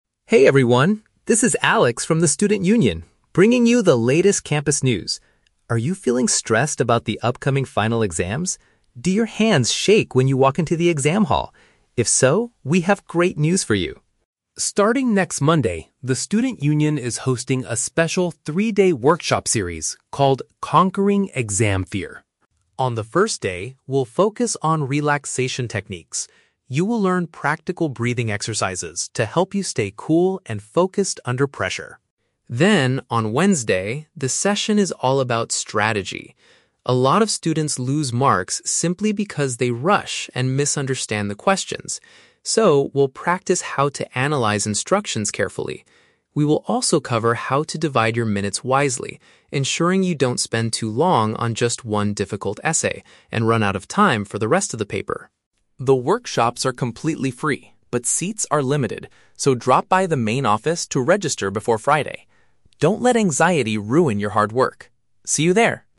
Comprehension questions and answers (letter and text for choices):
Listen to the radio announcement by a Student Union representative and choose the correct answer (A, B, or C) for each question.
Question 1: What will students learn to do during the first session of the workshop?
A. Maintain control of their nerves using breathing methods.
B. Shake their hands properly before an important interview.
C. Memorize their study materials faster under pressure.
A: A. Maintain control of their nerves using breathing methods.

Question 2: According to the speaker, what is a common mistake that causes students to lose points?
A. They spend too much time registering at the main office.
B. They fail to read and understand the task requirements accurately.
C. They arrive late to the exam hall because of high anxiety.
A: B. They fail to read and understand the task requirements accurately.

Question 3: What does the speaker teach students to avoid doing during a test?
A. Using up all their available time on a single challenging question.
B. Taking too many breaks to practice their breathing exercises.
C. Leaving the exam hall before the paper is completely finished.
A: A. Using up all their available time on a single challenging question.

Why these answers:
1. The speaker says, "You will learn practical breathing exercises to help you stay cool and focused." Option A perfectly paraphrases this as maintaining control using breathing methods. Option B is a trap; the speaker asks, "Do your hands shake...?", but this is a symptom of stress, not a skill they will learn. Option C is plausible for a study workshop, but memorization is not mentioned.
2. The speaker states that students lose marks "because they rush and misunderstand the questions." Option B paraphrases this as failing to read and understand the task requirements accurately. Option A is a trap; the "main office" is where you go to register for the workshop, it is not a reason for losing points. Option C is a plausible guess but is never mentioned in the audio.
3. The speaker warns students to ensure they "don't spend too long on just one difficult essay." Option A perfectly paraphrases this as using up all time on a single challenging question. Option B is a trap; breathing exercises are taught on the first day, but the speaker never mentions taking too many breaks during the test. Option C is not mentioned at all.

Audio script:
Alex: Hey everyone, this is Alex from the Student Union, bringing you the latest campus news. Are you feeling stressed about the upcoming final exams? Do your hands shake when you walk into the exam hall? If so, we have great news for you.
Starting next Monday, the Student Union is hosting a special three-day workshop series called 'Conquering Exam Fear'.
On the first day, we'll focus on relaxation techniques. You will learn practical breathing exercises to help you stay cool and focused under pressure.
Then, on Wednesday, the session is all about strategy. A lot of students lose marks simply because they rush and misunderstand the questions. So, we'll practice how to analyze instructions carefully. We will also cover how to divide your minutes wisely, ensuring you don't spend too long on just one difficult essay and run out of time for the rest of the paper.
The workshops are completely free, but seats are limited. So, drop by the main office to register before Friday. Don't let anxiety ruin your hard work. See you there!